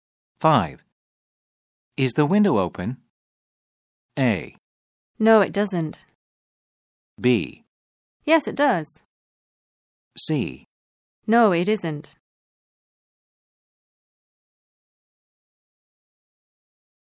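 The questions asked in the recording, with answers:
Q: Is the window open?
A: C: No, it isn't.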